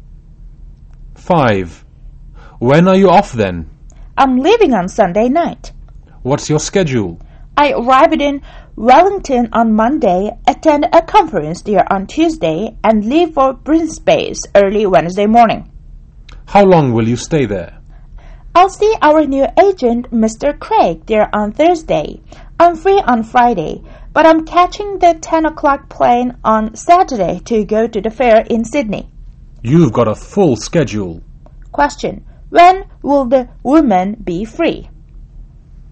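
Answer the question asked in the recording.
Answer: On Friday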